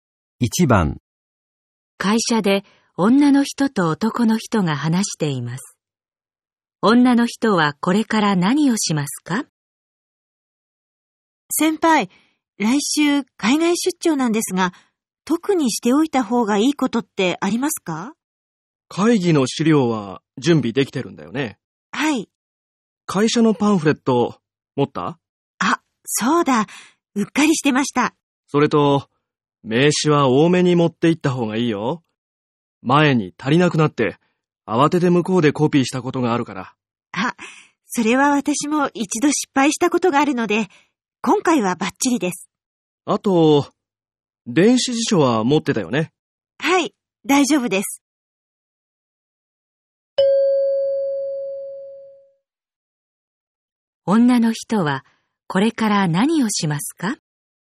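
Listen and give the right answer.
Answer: 会社のパンフレットを準備する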